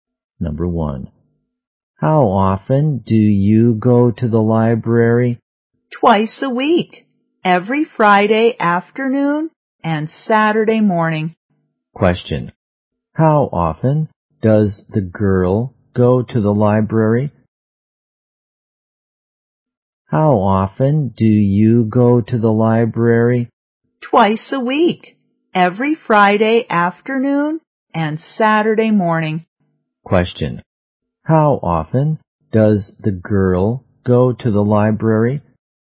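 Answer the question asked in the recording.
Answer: Twice a week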